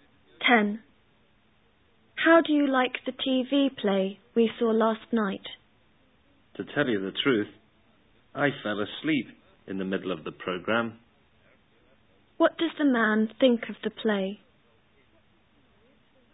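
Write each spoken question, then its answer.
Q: What does the man think of the play?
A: It was boring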